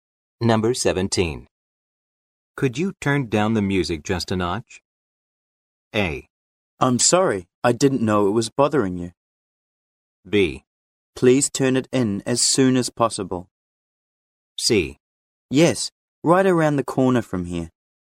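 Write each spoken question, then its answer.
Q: Could you turn down the music just a notch?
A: A: I'm sorry, I didn't know it was bothering you.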